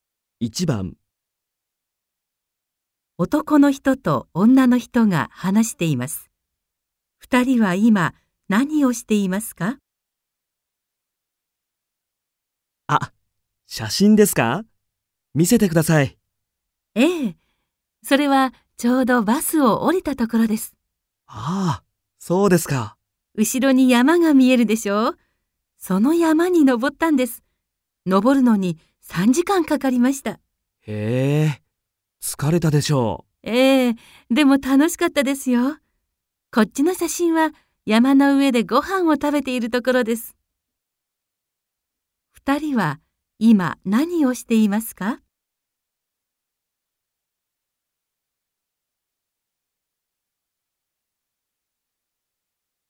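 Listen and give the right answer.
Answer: 写真を見ています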